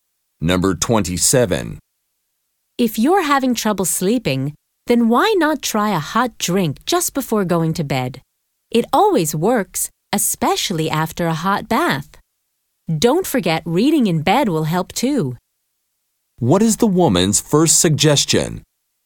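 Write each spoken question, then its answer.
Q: What is the woman's first suggestion?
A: A hot drink before bed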